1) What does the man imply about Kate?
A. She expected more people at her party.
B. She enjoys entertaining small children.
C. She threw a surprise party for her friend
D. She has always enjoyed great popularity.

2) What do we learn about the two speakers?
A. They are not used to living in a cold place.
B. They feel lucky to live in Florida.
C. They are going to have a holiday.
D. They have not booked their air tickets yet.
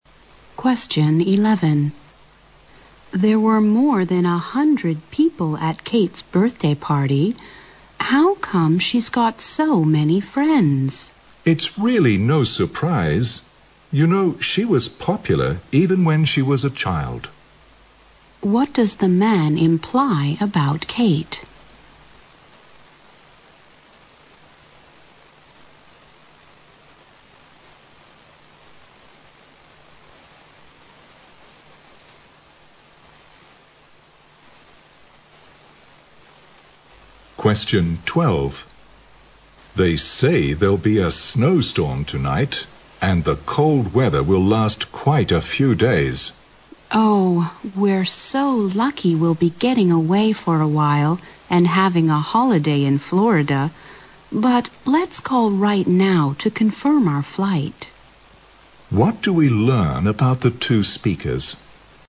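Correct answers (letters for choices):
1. D
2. C

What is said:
W: There were more than a hundred people at Kate's birthday party. How come she's got so many friends?
M: It's really no surprise. You know she was popular even when she was a child.
Q: What does the man imply about Kate?
M: They say there'll be a snow-storm tonight, and the cold weather will last quite a few days.
W: Oh! We're so lucky, we'll be getting away for a while, and having a holiday in Florida. But let's call right now to confirm our flight.
Q: What do we learn about the two speakers?

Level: 大学英语四级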